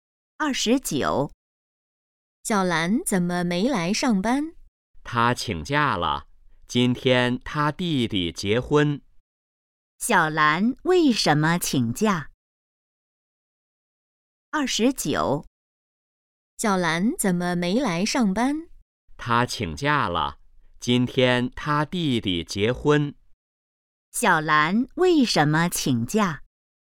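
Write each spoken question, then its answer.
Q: 小兰为什么请假?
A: 弟弟结婚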